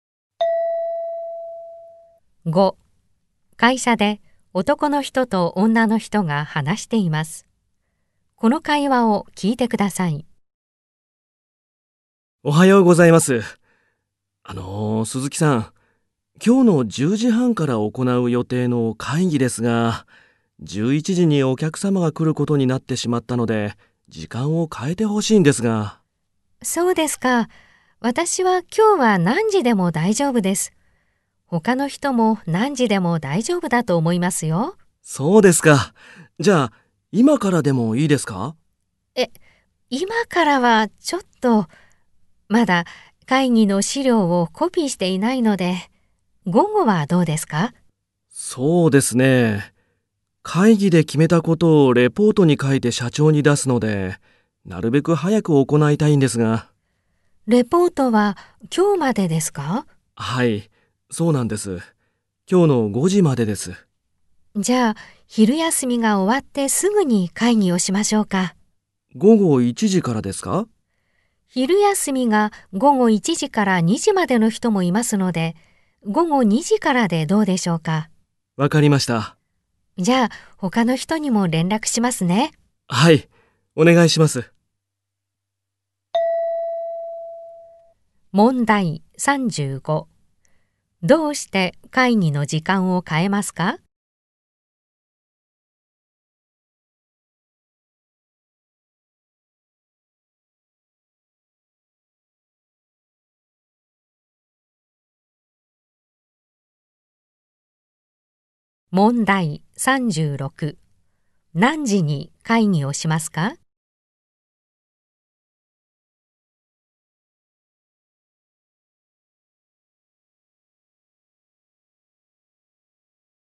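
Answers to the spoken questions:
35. 11時にお客様が来るから
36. 午後2時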